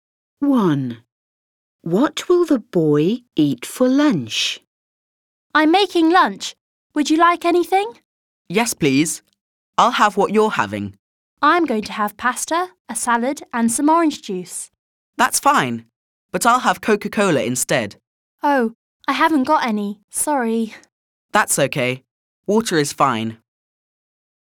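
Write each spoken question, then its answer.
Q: What will the boy eat for lunch?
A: Pasta and salad, with water to drink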